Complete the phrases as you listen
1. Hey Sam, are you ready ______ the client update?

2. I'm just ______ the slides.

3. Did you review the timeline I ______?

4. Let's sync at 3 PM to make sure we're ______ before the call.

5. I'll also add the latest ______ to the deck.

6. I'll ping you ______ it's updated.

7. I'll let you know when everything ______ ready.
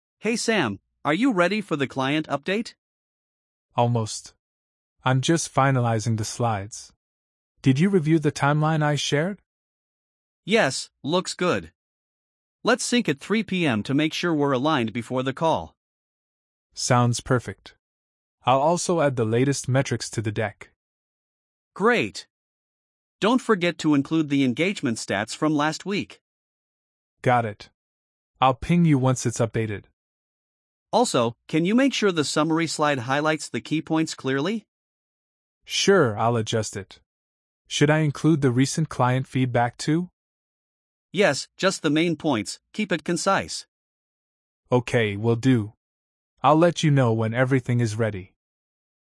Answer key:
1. for
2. finalizing
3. shared
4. aligned
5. metrics
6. once
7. is

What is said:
Alex: Hey Sam, are you ready for the client update?
Sam: Almost. I'm just finalizing the slides. Did you review the timeline I shared?
Alex: Yes, looks good. Let's sync at 3 PM to make sure we're aligned before the call.
Sam: Sounds perfect. I'll also add the latest metrics to the deck.
Alex: Great! Don't forget to include the engagement stats from last week.
Sam: Got it. I'll ping you once it's updated.
Alex: Also, can you make sure the summary slide highlights the key points clearly?
Sam: Sure, I'll adjust it. Should I include the recent client feedback too?
Alex: Yes, just the main points, keep it concise.
Sam: Okay, will do. I'll let you know when everything is ready.
Perfect! "I'll let you know when everything is ready."